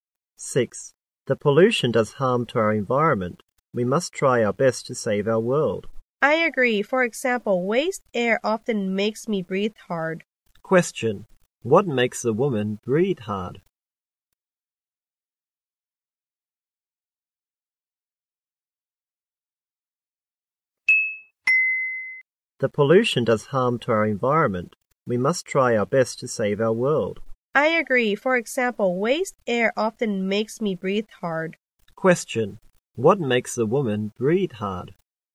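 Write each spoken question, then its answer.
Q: What makes a woman breathe hard?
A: Waste air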